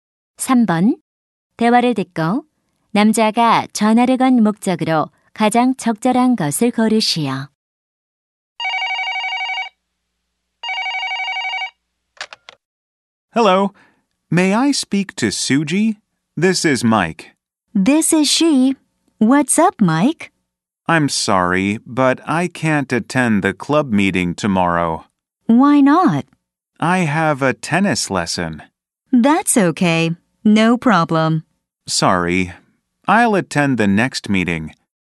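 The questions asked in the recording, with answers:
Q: 대화를 듣고 남자가 전화를 건 목적으로 가장 적절한 것을 고르시오.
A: 동아리 모임에 참석하지 못함을 알리려고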